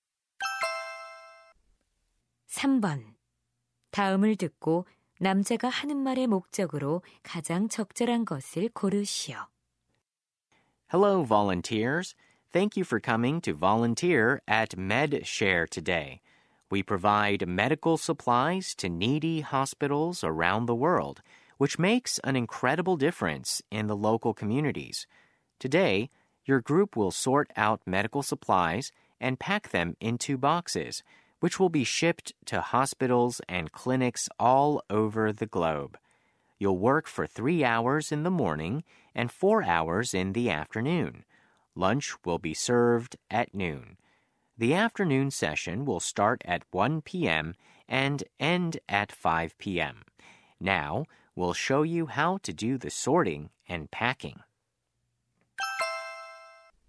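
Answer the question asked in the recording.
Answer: 자원봉사 활동 내용과 일정을 안내하려고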